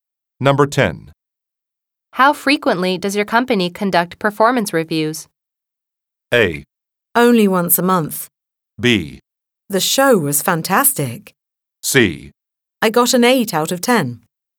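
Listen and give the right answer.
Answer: A: Only once a month.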